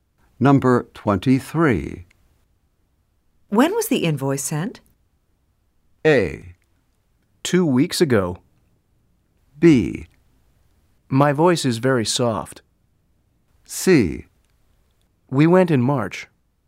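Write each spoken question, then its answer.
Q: When was the invoice sent?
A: A: 2 weeks ago.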